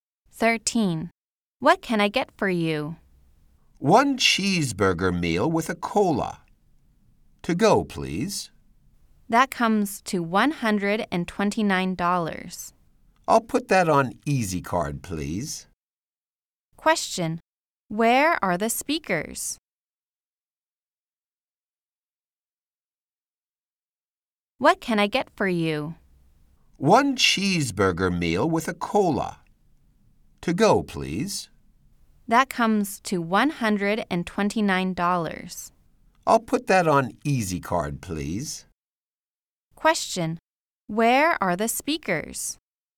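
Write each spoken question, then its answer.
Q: Where are the speakers?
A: At a fast food restaurant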